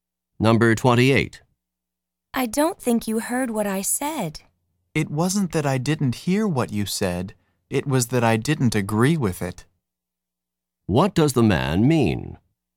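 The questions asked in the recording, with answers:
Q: What does the man mean?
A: He heard her but disagreed.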